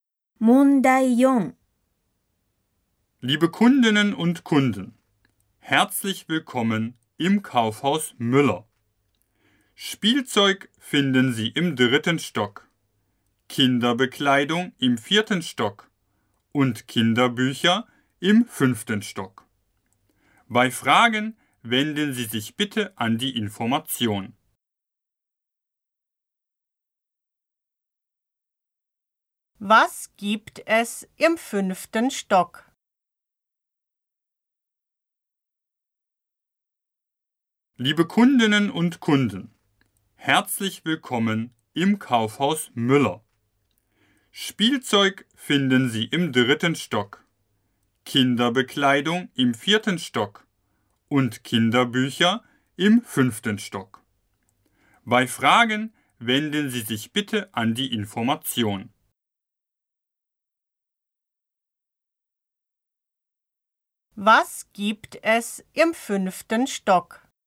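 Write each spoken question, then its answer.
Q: Was gibt es im fünften Stock?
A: Kinderbücher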